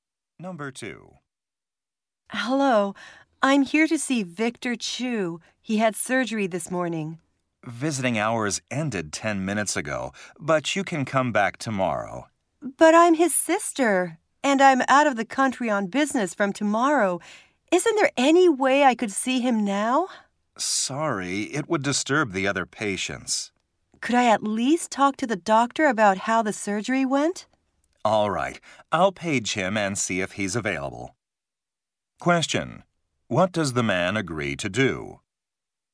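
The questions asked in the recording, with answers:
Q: What does the man agree to do?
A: Page the doctor so she can ask how the surgery went.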